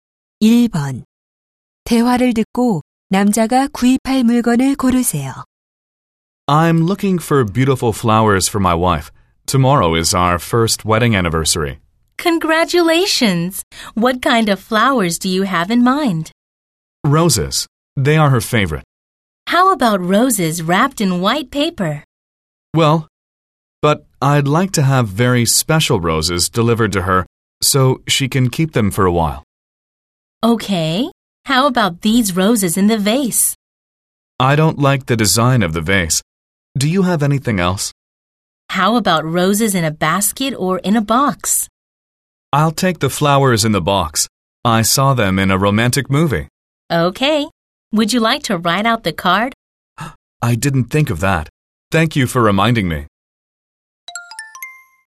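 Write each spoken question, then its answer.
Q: 대화를 듣고 남자가 구입할 물건을 고르세요.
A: 상자에 담긴 장미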